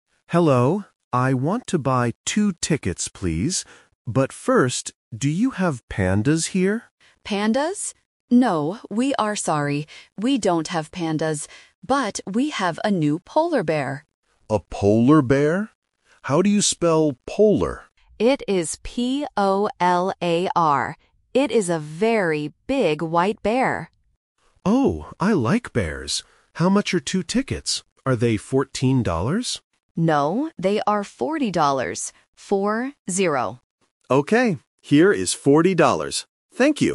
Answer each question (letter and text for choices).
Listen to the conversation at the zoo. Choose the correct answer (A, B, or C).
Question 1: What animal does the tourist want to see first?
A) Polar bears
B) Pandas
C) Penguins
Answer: B) Pandas

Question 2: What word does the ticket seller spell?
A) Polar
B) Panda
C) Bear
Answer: A) Polar

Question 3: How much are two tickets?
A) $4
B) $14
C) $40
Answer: C) $40

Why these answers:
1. The tourist asks, "But first, do you have pandas here?" Option A (Polar bears) is the trap because the zoo has them, but the tourist asks about pandas first. Option C (Penguins) is not mentioned.
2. The tourist asks how to spell "polar", and the ticket seller says, "P-O-L-A-R." Option B (Panda) is a trap because they talk about pandas, but they do not spell the word. Option C (Bear) is mentioned but not spelled.
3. The ticket seller says, "No, they are forty dollars. Four, zero." Option B ($14) is the trap because the tourist guesses "fourteen dollars" and it sounds very similar. Option A ($4) is just a distractor from the word "four".